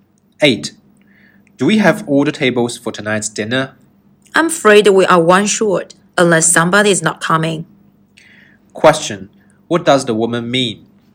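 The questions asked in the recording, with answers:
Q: What does the woman mean?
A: They need one more table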